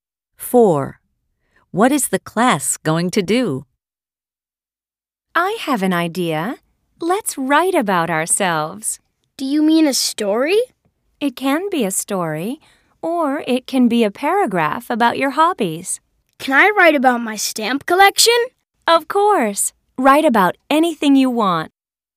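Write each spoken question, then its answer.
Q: What is the class going to do?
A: write about themselves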